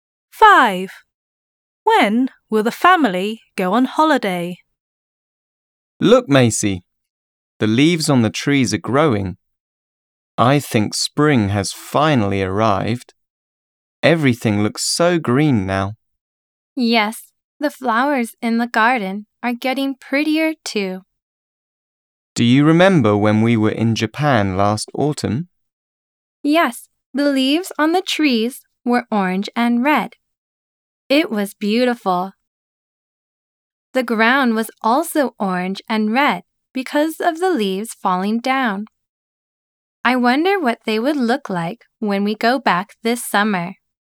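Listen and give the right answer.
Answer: This summer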